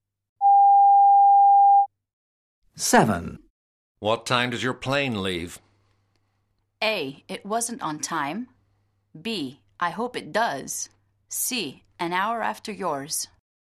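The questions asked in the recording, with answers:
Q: What time does your plane leave?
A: C: An hour after yours.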